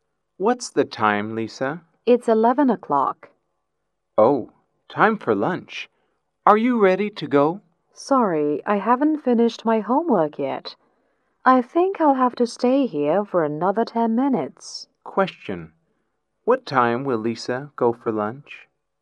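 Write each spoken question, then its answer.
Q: What time will Lisa go for lunch?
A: At 11:10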